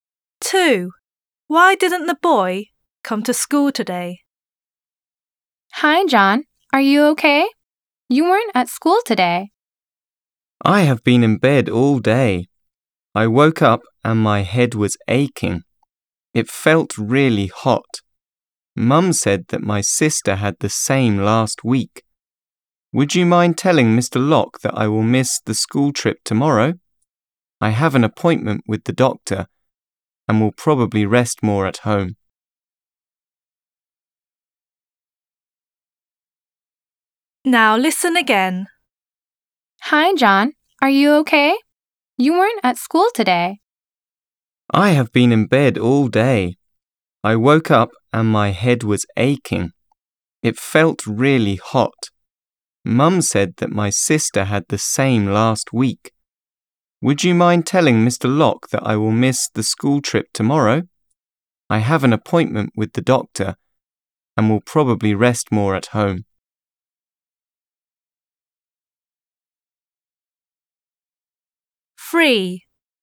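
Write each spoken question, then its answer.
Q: Why didn't the boy come to school today?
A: He was ill, with a headache and a high temperature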